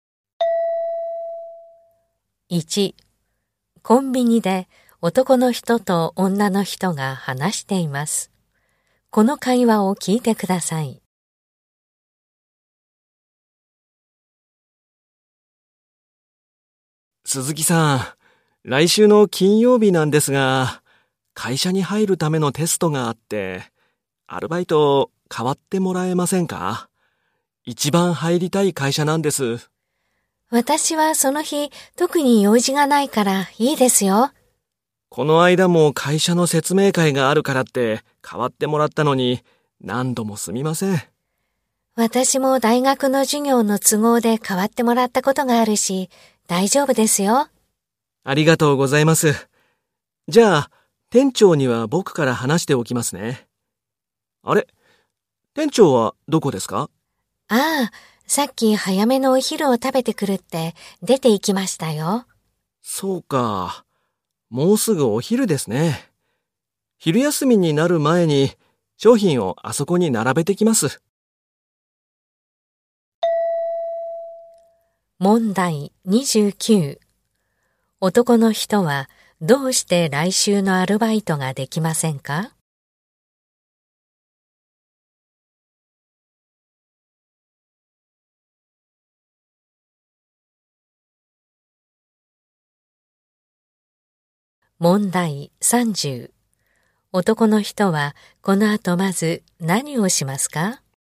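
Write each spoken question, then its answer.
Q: 男の人はどうして来週のアルバイトができませんか?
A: 会社に入るためのテストがあるから

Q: 男の人はこの後まず何をしますか?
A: 商品を並べる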